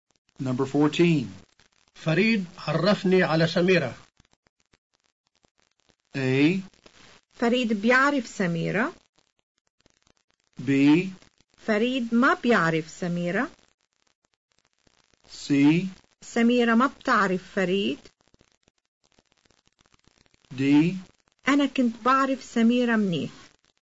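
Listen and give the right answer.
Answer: A: فريد بيعرف سميرة.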